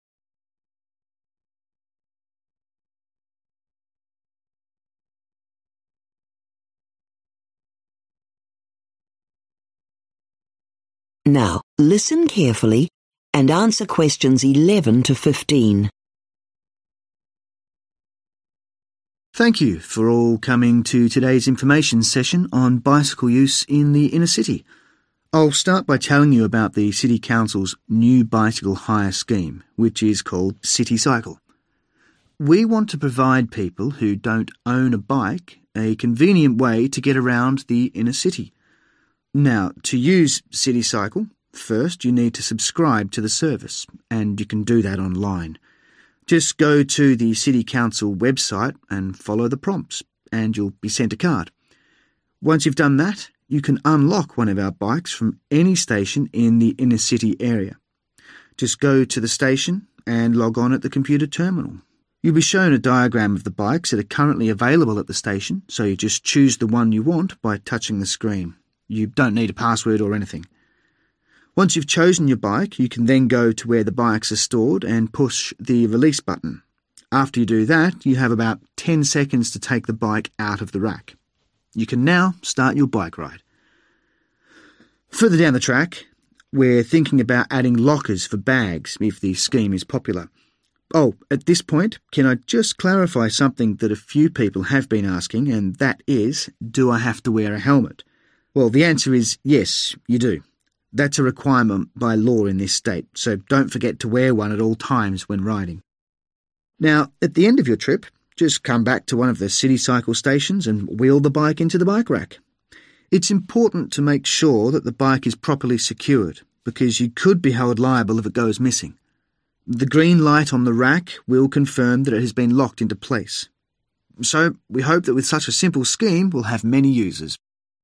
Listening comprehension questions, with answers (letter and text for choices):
Choose the correct letter, A, B or C.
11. To subscribe to City Cycle you need to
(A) visit a station in person.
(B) register at a computer terminal.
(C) go online to the Council website.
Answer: (C) go online to the Council website.

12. At the station you choose your bike by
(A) touching a screen showing available bikes.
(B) entering your password into a terminal.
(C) pressing a button on the bike rack.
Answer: (A) touching a screen showing available bikes.

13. After choosing your bike you have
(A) 30 seconds to take it from the rack.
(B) about 10 seconds to take it from the rack.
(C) 5 seconds before the alarm sounds.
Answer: (B) about 10 seconds to take it from the rack.

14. To return the bike you must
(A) notify the City Cycle website.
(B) return it to the same station.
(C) make sure it is properly secured in the rack.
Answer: (C) make sure it is properly secured in the rack.

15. A green light on the rack means the bike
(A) is available for hire.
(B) needs to be recharged.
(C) has been properly locked in place.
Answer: (C) has been properly locked in place.